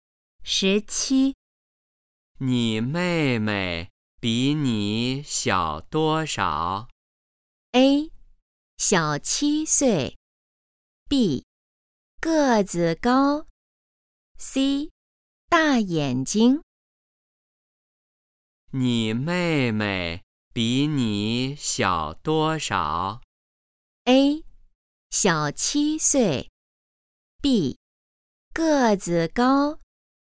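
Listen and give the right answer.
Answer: A: 小七岁。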